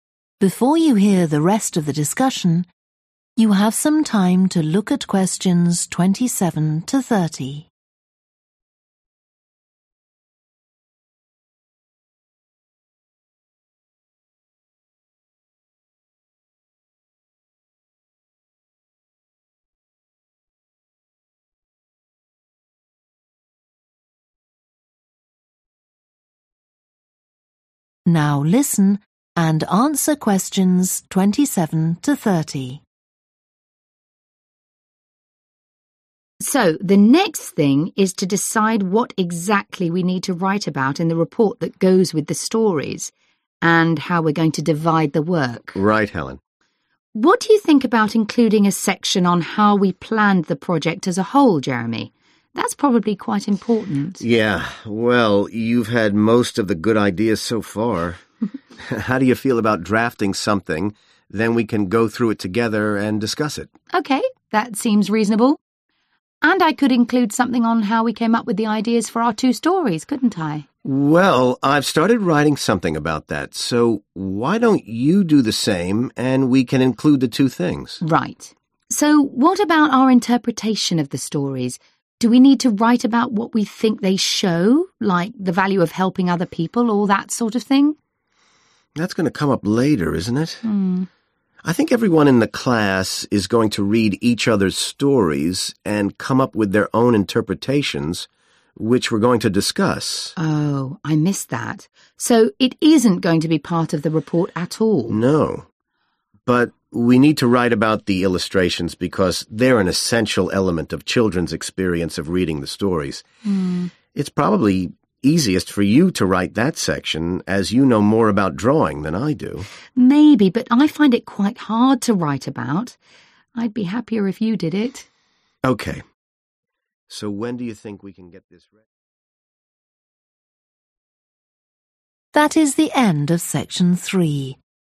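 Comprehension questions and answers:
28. how they had ideas for their stories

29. an interpretation of their stories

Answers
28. both Helen and Jeremy
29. neither (not in the report)

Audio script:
HELEN: So the next thing is to decide what exactly we need to write about in the report that goes with the stories, and how we're going to divide the work.
JEREMY: Right, Helen.
HELEN: What do you think about including a section on how we planned the project as a whole, Jeremy? That's probably quite important.
JEREMY: Yeah. Well, (Q27) you've had most of the good ideas so far. How do you feel about drafting (= plan) something, then we can go through it together and discuss it?
HELEN: OK, that seems reasonable.
JEREMY: (Q28) Well, I've started writing something about that, so why don't you do the same and we can include the two things.
HELEN: Right. So what about our interpretation of the stories? 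Do we need to write about what we think they show, like the value of helping other people, all that sort of thing?
JEREMY: (Q29) That's going to come up later, isn't it? I think everyone in the class is going to read each other's stories and come up with their own interpretations which we're going to discuss.
HELEN: Oh, I missed that. So it isn't going to be part of the report at all?
JEREMY: No. But we need to write about the illustrations (= comments on the illustrations), because they're an essential element of children's experience of reading the stories. It's probably easiest for you to write that section, as you know more about drawing than I do.
HELEN: (Q30) Maybe, but I find it quite hard to write about. I'd be happier if you did it.
JEREMY: OK. So when do you think ...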